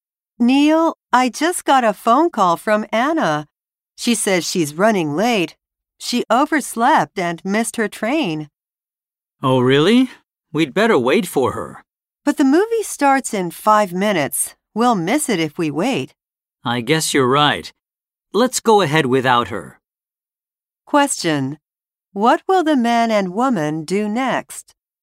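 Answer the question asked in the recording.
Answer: Go to the movie without Anna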